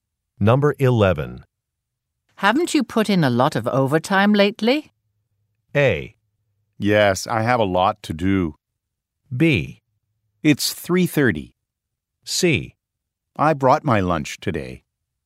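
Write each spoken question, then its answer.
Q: Haven't you put in a lot of overtime lately?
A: A: Yes, I have a lot to do.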